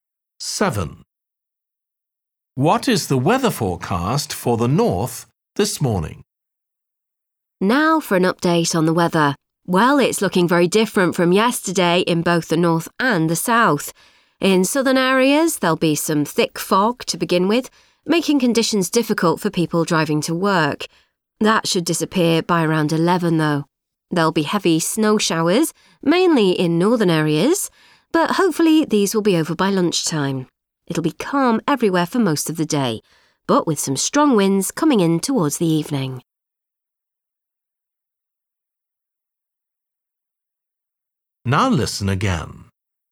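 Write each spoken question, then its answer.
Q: What is the weather forecast for the north this morning?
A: heavy snow showers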